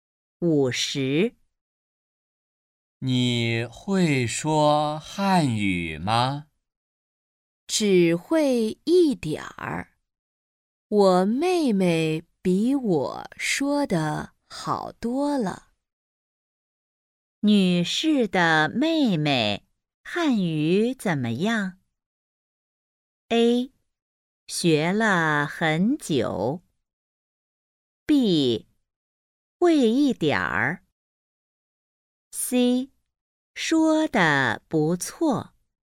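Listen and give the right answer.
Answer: C: 说得不错。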